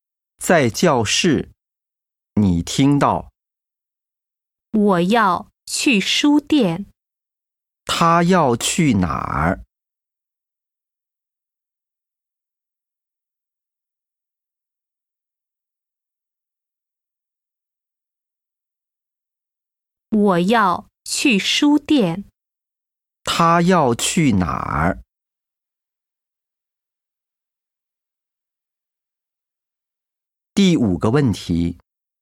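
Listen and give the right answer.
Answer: 书店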